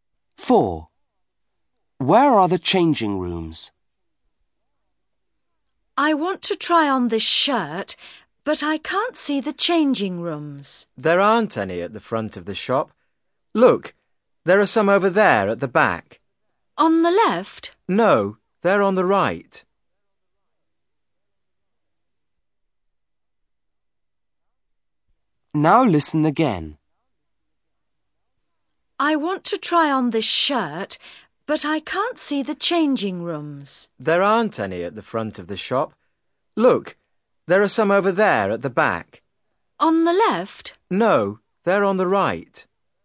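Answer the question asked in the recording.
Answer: At the back on the right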